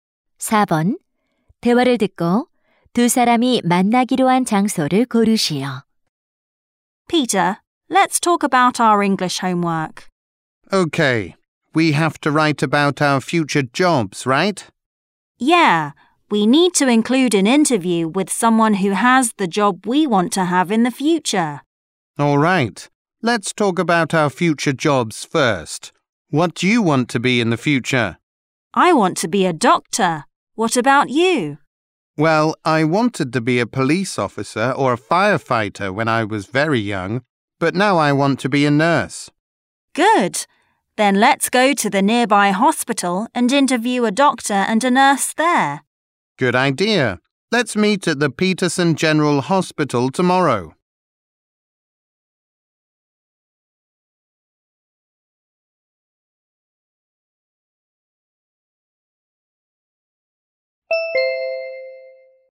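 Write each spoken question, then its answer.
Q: 대화를 듣고 두 사람이 만나기로 한 장소를 고르시오.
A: 피터슨 종합병원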